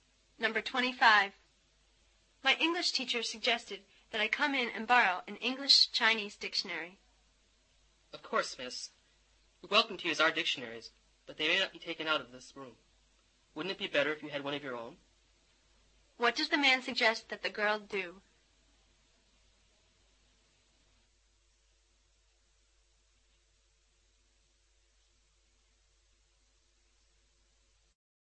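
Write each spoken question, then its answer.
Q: What does the man suggest that the girl do?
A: Get a dictionary of her own.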